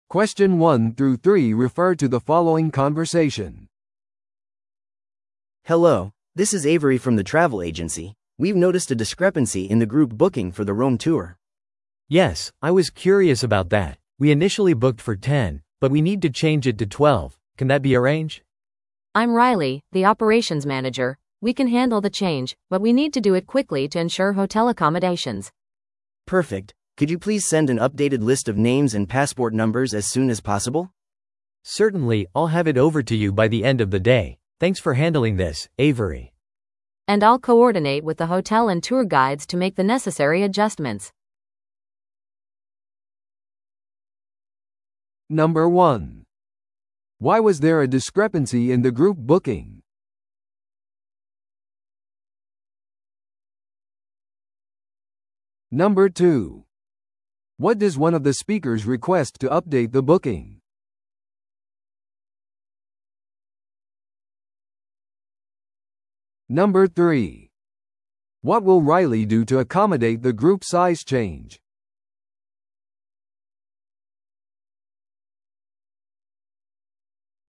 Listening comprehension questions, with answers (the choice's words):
Listen to the audio below and answer the questions.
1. Why was there a discrepancy in the group booking?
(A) ツアーが定員オーバーだった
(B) グループの人数が増えた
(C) 支払いが見落とされた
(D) 目的地が変更された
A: グループの人数が増えた

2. What does one of the speakers request to update the booking?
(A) 改訂された旅程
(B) 新しい旅行保険のポリシー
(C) 更新された名前とパスポート番号のリスト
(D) フライト確認の詳細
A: 更新された名前とパスポート番号のリスト

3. What will Riley do to accommodate the group size change?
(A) 旅行パンフレットを改訂する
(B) 10人分の予約をする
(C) ツアーの日程を調整する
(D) ホテルとツアーガイドと連携する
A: ホテルとツアーガイドと連携する

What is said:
A: Hello, this is Avery from the travel agency. We've noticed a discrepancy in the group booking for the Rome tour.
B: Yes, I was curious about that. We initially booked for ten, but we need to change it to twelve. Can that be arranged?
C: I'm Riley, the operations manager. We can handle the change, but we need to do it quickly to ensure hotel accommodations.
A: Perfect. Could you please send an updated list of names and passport numbers as soon as possible?
B: Certainly, I'll have it over to you by the end of the day. Thanks for handling this, Avery.
C: And I'll coordinate with the hotel and tour guides to make the necessary adjustments.